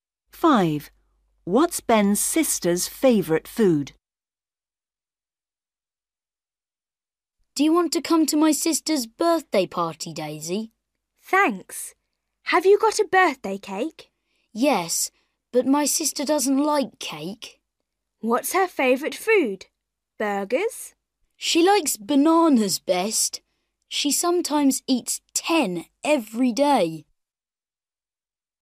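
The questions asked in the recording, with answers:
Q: What's Ben's sister's favourite food?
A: bananas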